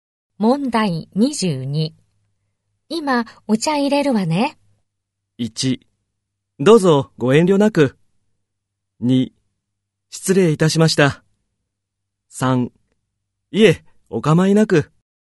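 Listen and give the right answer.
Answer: 3: いえ、お構いなく。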